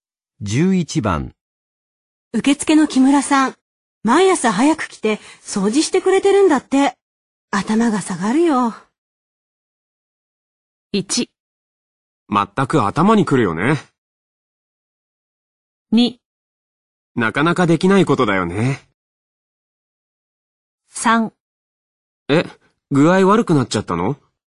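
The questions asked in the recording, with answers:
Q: 受付の木村さん、毎朝早く来て掃除してくれてるんだって。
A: 2: なかなかできないことだよね。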